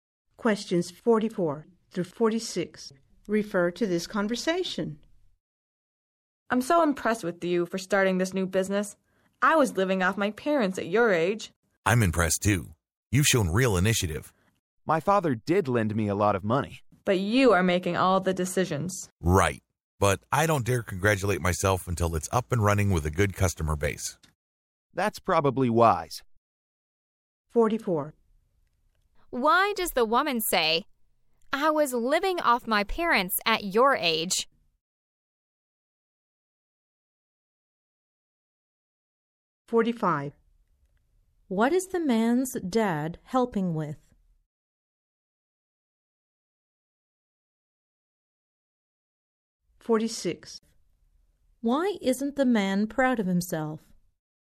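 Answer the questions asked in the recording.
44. To praise the man for starting a business so young
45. Money for the business
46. The business isn't up and running with a good customer base yet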